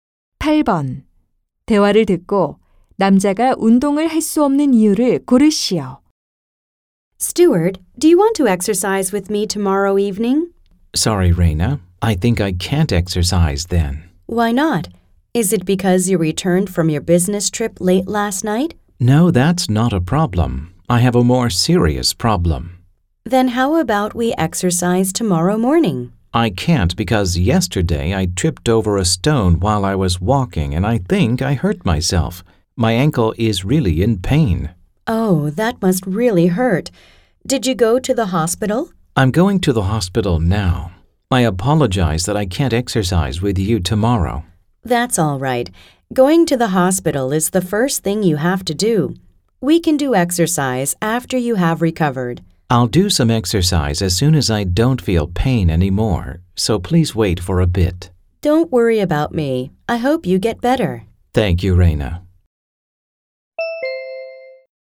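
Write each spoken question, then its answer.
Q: 대화를 듣고 남자가 운동을 할 수 없는 이유를 고르시오.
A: 발목을 다쳐서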